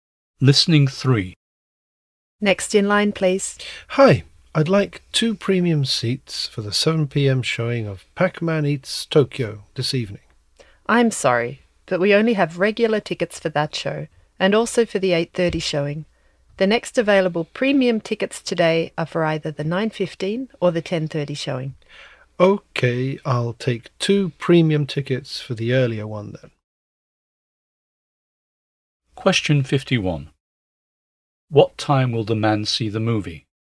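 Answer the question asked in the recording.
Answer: At 9:15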